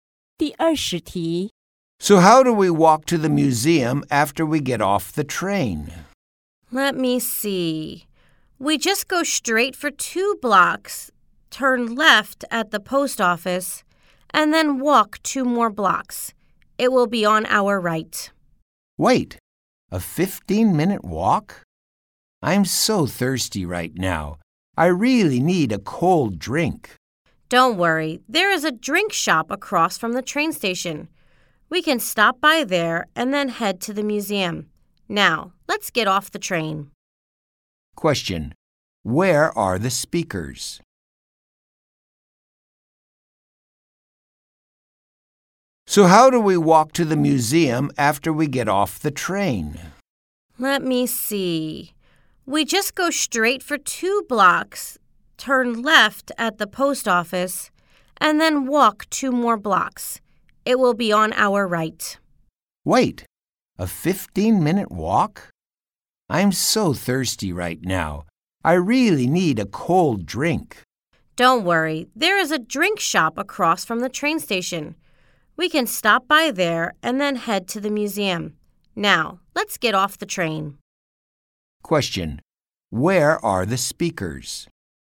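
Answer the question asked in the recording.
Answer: On a train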